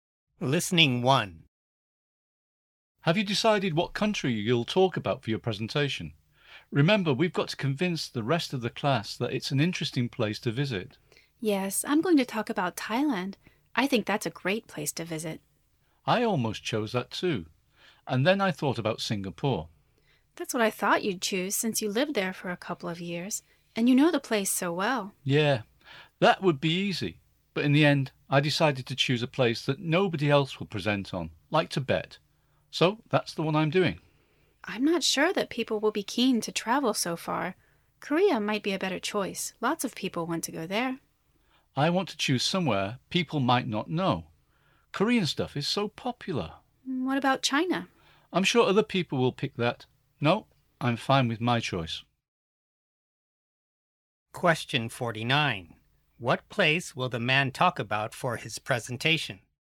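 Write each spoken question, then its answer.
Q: What place will the man talk about for his presentation?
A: Tibet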